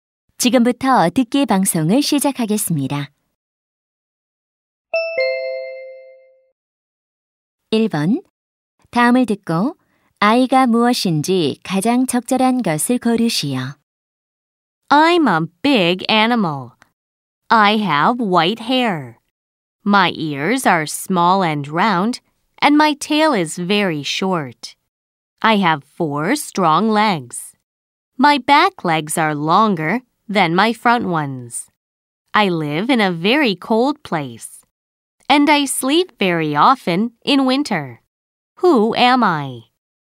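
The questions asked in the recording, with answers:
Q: 다음을 듣고 아이가 무엇인지 가장 적절한 것을 고르시오.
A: 북극곰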